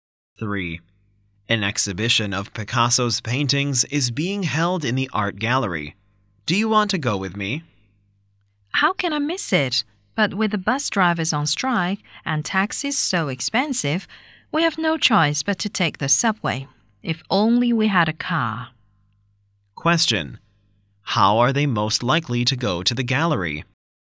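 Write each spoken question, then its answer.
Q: How are they most likely to go to the gallery?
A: By subway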